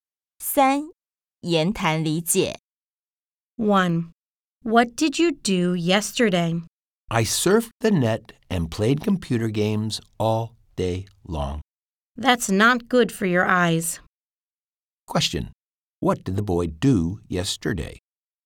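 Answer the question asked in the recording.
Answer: He surfed the net and played computer games all day long.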